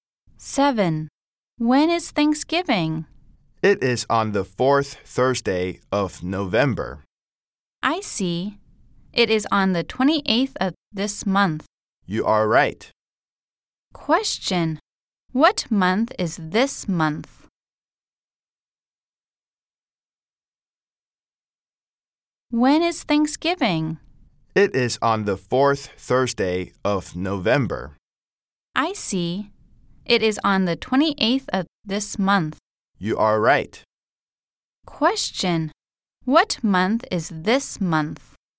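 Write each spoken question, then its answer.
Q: Question. What month is this month?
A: November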